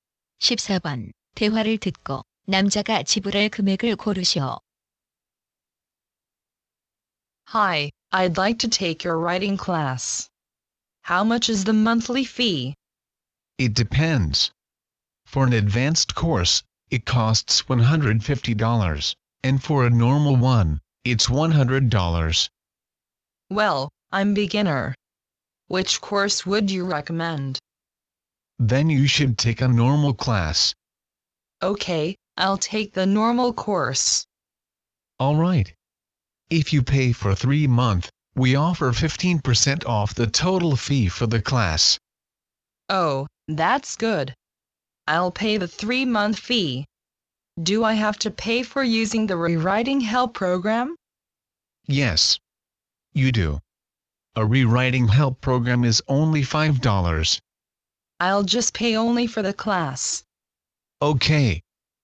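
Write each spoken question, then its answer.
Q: 대화를 듣고 남자가 지불할 금액을 고르시오.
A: $255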